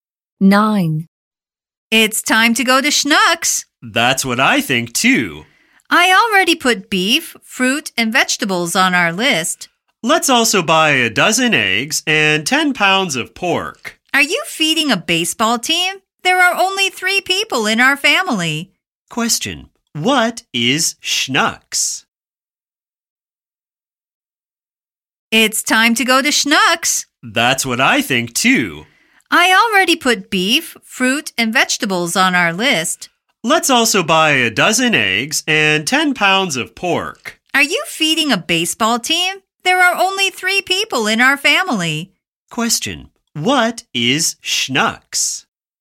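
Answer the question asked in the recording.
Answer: A supermarket (grocery store).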